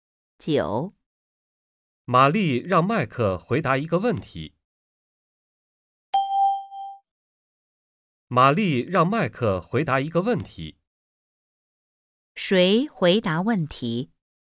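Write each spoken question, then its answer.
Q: 谁回答问题?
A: 麦克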